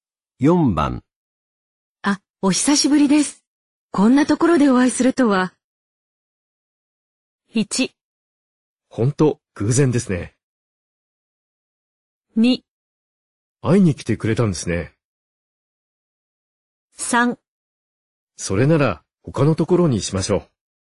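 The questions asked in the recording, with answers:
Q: あ、お久しぶりです。こんなところでお会いするとは。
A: 1: ほんと、偶然ですね。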